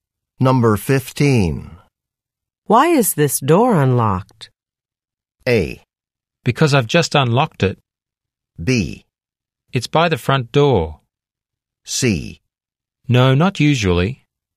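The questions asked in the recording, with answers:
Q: Why is this door unlocked?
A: A: Because I've just unlocked it.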